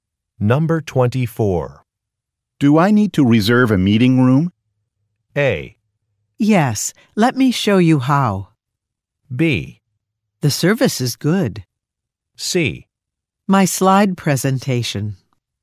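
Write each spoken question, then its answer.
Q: Do I need to reserve a meeting room?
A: A: Yes, let me show you how.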